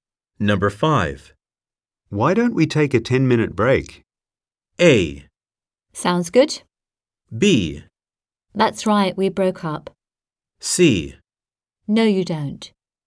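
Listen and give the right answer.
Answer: A: Sounds good.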